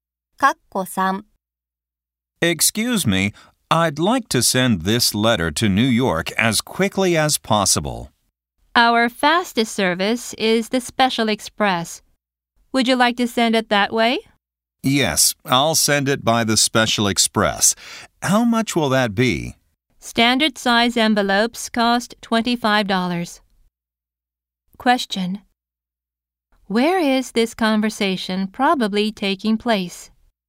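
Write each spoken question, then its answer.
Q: Where is this conversation probably taking place?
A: At a post office.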